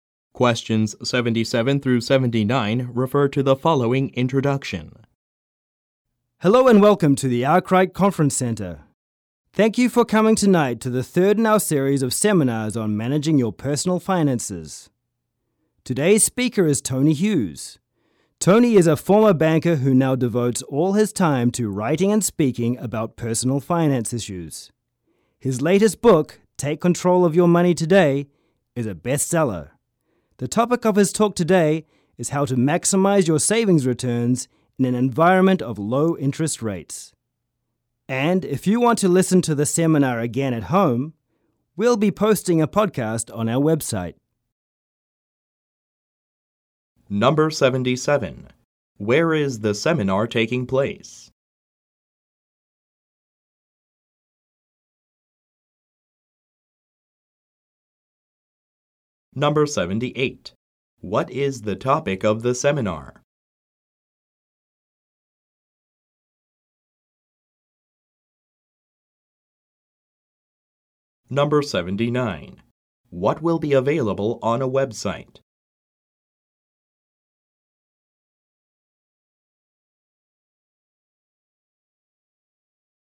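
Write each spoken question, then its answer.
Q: Where is the seminar taking place?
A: At the Arkwright Conference Center

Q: What is the topic of the seminar?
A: How to maximize savings returns when interest rates are low

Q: What will be available on a website?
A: A podcast of the seminar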